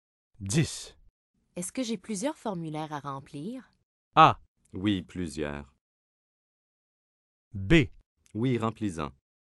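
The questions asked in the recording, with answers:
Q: Est-ce que j'ai plusieurs formulaires à remplir?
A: A: Oui, plusieurs.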